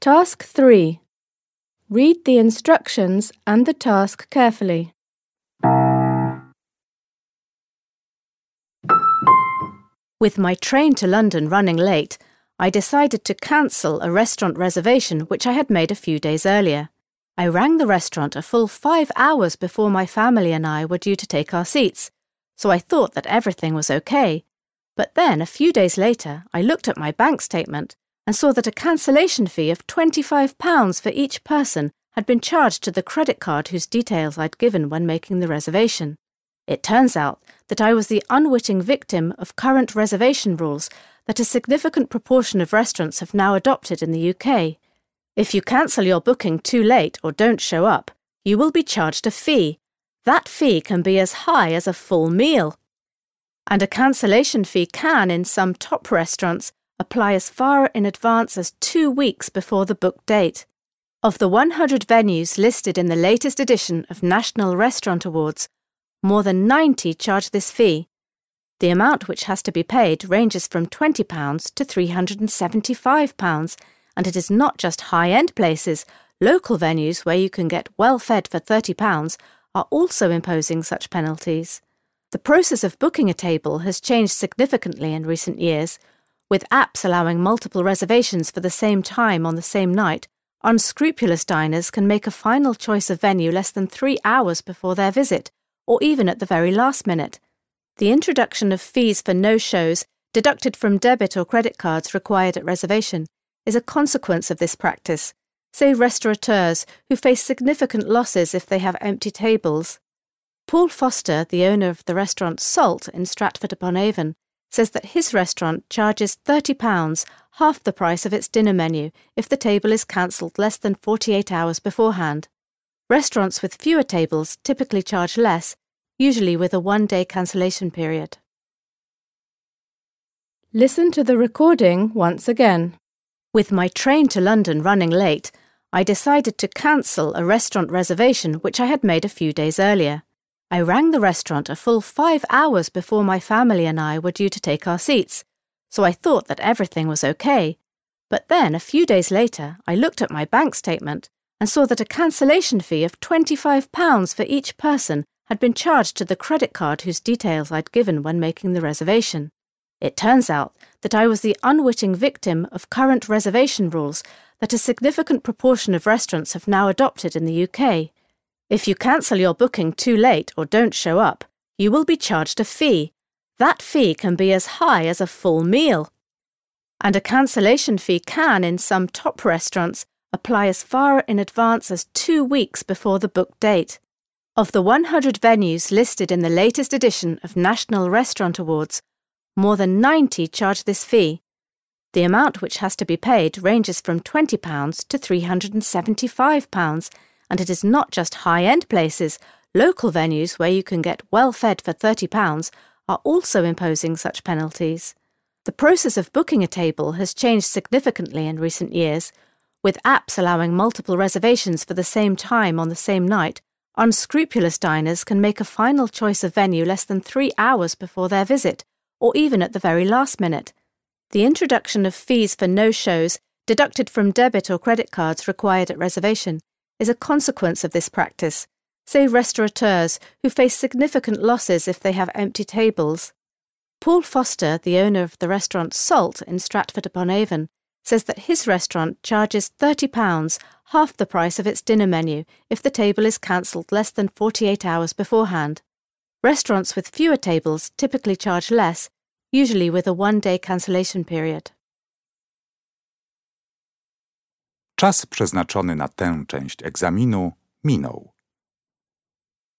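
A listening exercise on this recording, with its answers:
Based on what you hear, complete the gap in each sentence (3.1.–3.4.). You will hear the recording twice.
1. When the speaker , she discovered that she had been charged a cancellation fee.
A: checked her bank statement

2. £20 is imposed by restaurants which are featured in the latest edition of National Restaurant Awards and follow the new trend.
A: The lowest fee of

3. The problem for restaurant owners is that they due to multiple bookings.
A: face significant losses because of empty tables

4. To avoid paying the no-show fee at Paul Foster's restaurant, you have to before your visit is due to start.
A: cancel your table at least 48 hours

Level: Poziom: dwujęzyczny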